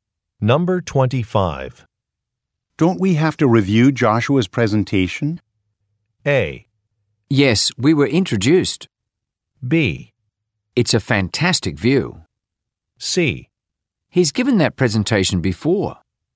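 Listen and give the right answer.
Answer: C: He's given that presentation before.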